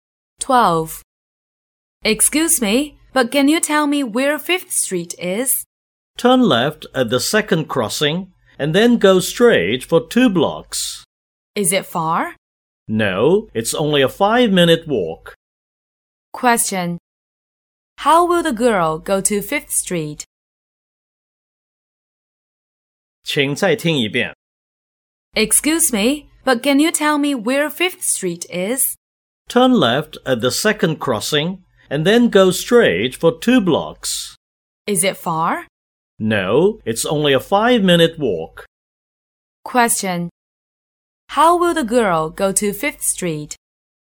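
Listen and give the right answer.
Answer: On foot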